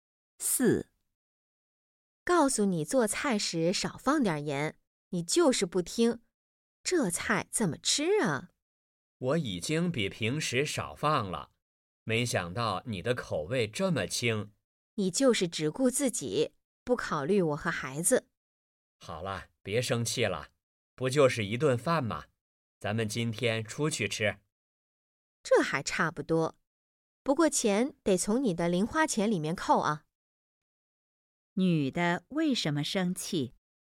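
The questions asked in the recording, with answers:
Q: 女的为什么生气?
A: 男的做菜放盐太多,菜太咸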